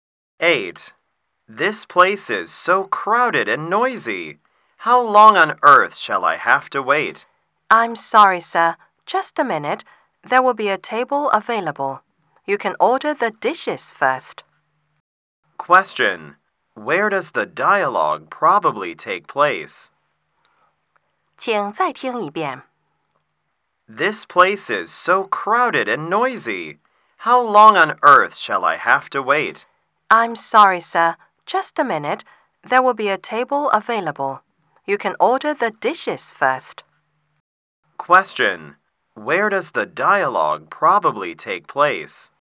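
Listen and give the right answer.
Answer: In a restaurant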